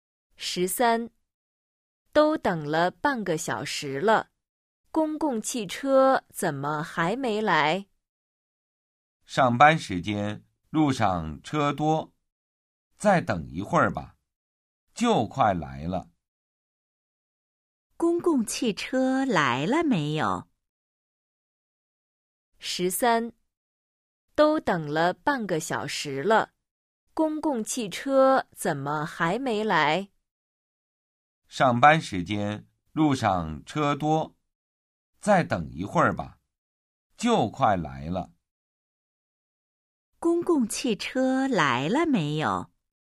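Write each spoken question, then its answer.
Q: 公共汽车来了没有?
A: 没有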